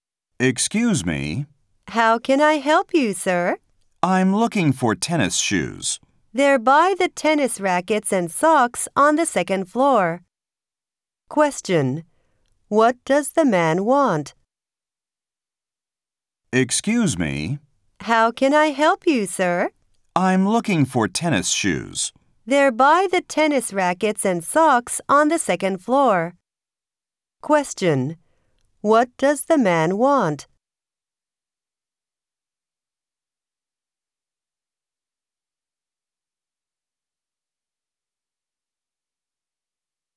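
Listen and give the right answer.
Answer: Tennis shoes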